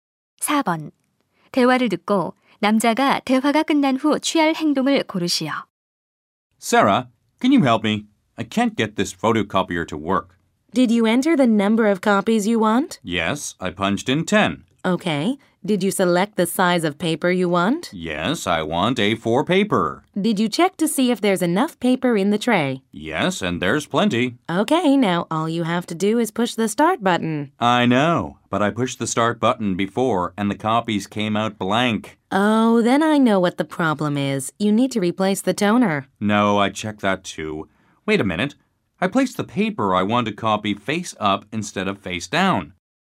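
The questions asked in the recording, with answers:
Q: 대화를 듣고 남자가 대화가 끝난 후 취할 행동을 고르시오.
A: 복사할 종이를 뒤집어 아래로 향하게 놓는다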